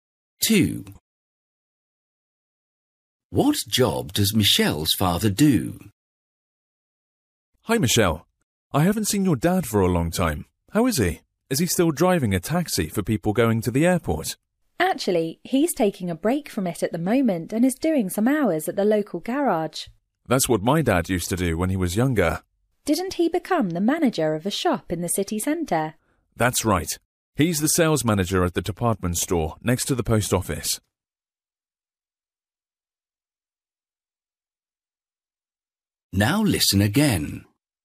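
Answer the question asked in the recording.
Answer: He works at the local garage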